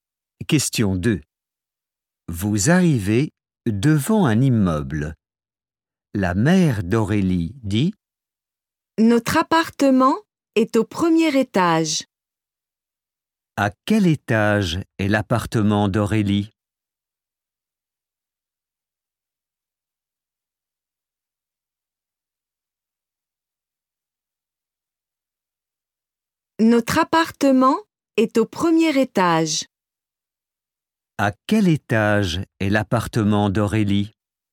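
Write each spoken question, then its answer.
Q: À quel étage est l'appartement d'Aurélie?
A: Au premier étage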